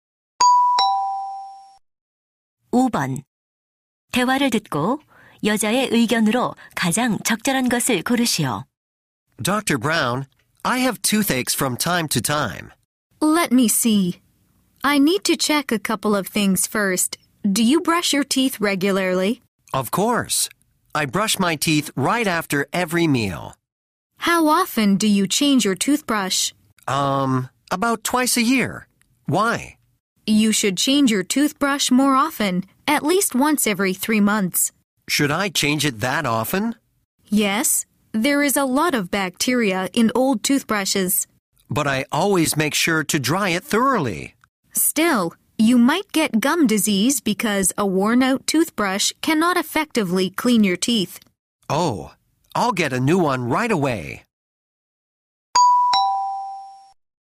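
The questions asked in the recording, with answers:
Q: 대화를 듣고 여자의 의견으로 가장 적절한 것을 고르시오.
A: 칫솔을 더 자주(최소 3개월마다) 교체해야 한다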